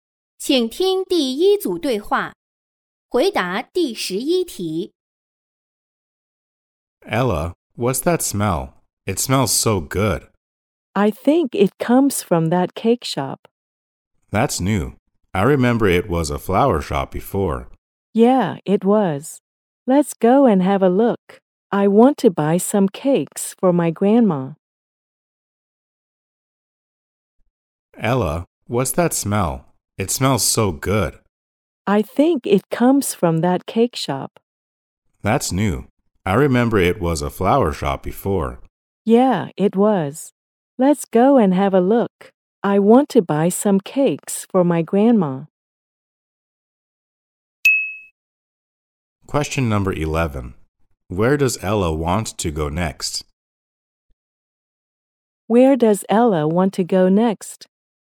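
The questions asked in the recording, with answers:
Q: Where does Ella want to go next?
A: The cake shop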